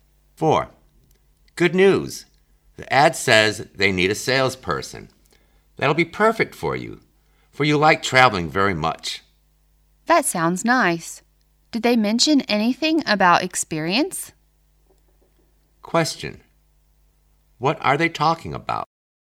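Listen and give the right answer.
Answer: A salesperson job advertisement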